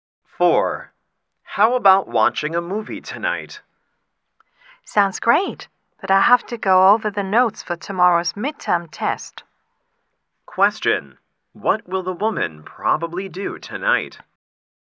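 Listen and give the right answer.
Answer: Go over her notes for tomorrow's midterm test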